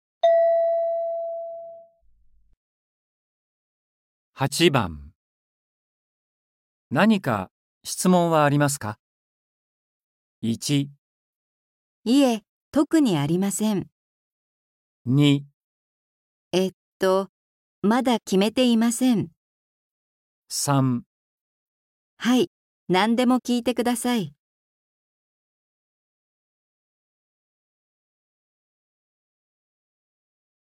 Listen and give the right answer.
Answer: 1

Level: N4.42